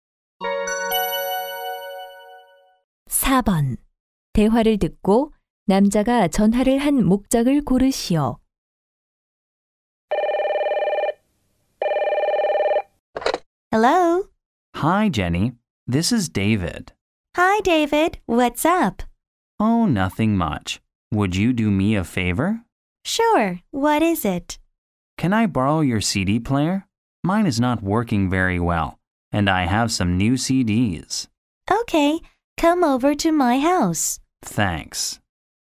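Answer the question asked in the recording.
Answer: CD 플레이어를 빌리려고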